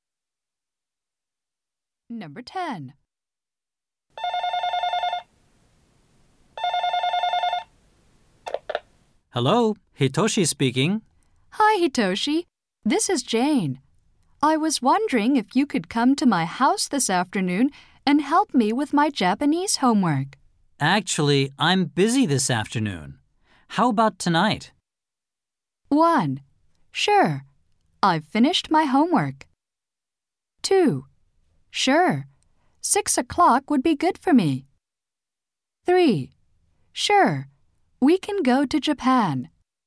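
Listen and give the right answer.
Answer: 2: Sure. 6 o'clock would be good for me.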